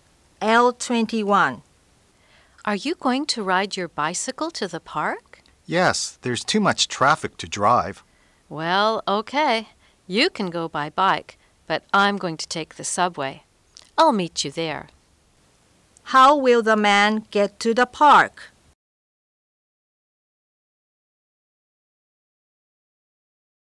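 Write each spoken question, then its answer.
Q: How will the man get to the park?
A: By bicycle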